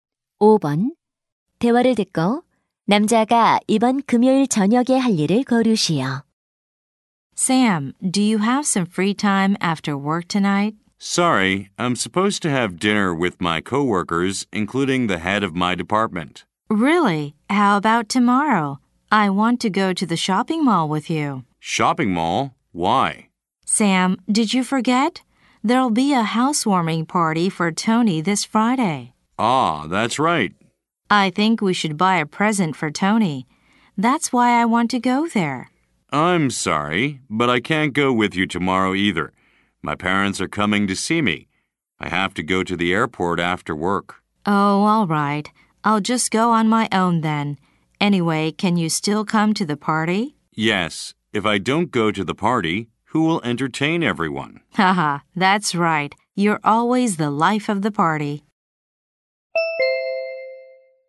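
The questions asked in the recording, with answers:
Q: 대화를 듣고 남자가 이번 금요일 저녁에 할 일을 거르시오.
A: Tony의 집들이 파티에 참석하기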